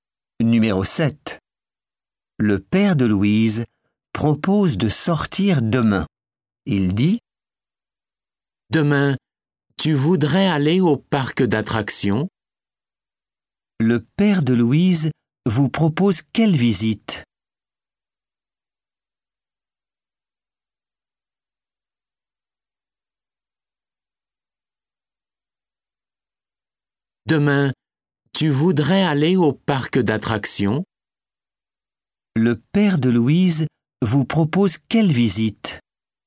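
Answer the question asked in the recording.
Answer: le parc d'attractions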